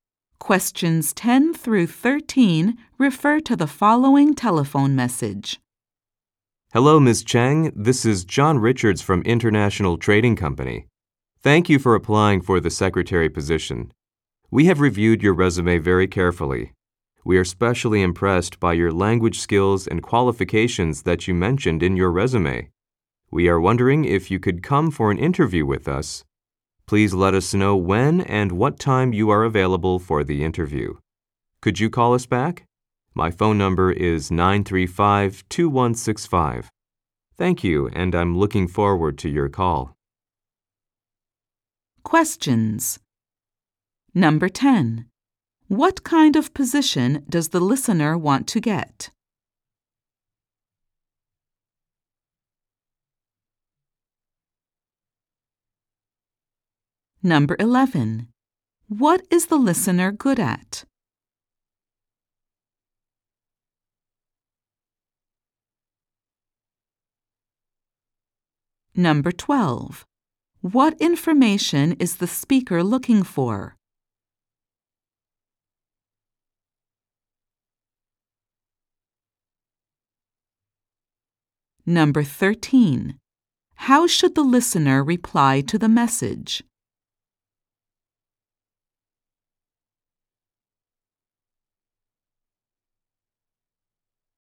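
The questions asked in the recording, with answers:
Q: What kind of position does the listener want to get?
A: A secretary position

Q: What is the listener good at?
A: Languages

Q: What information is the speaker looking for?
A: When the listener is available for an interview

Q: How should the listener reply to the message?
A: By calling back at 935-2165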